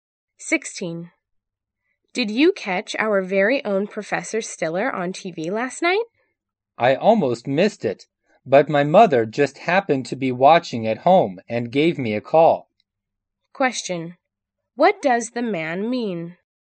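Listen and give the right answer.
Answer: He saw the program because his mother called him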